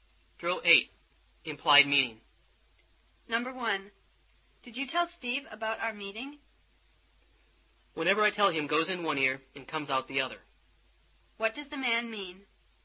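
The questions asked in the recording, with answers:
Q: What does the man mean?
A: Steve never listens to what he is told.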